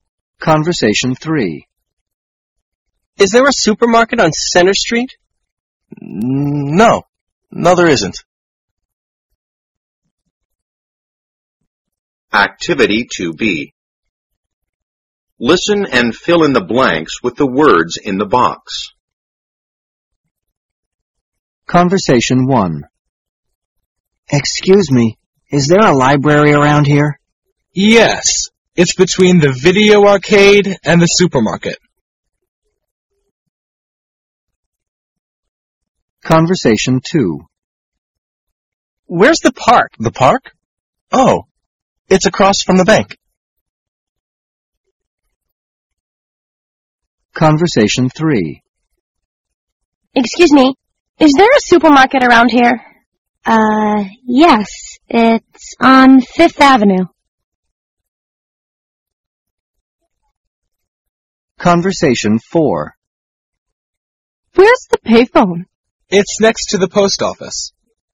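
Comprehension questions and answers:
Activity 2b.Listen and fill in the blanks with the words in the box.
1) The library is ____the video arcade and the supermarket.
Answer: between

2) The park is_____the bank.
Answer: across from

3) The supermarket is____Fifth Avenue.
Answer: on

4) The pay phone is_____the post office.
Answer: next to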